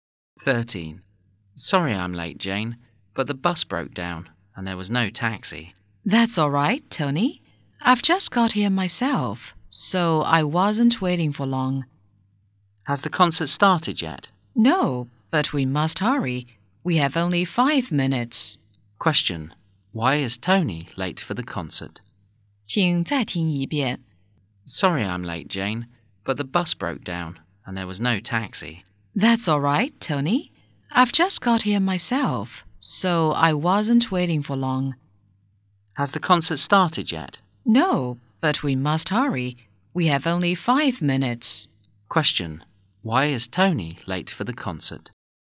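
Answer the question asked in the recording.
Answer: The bus broke down and there was no taxi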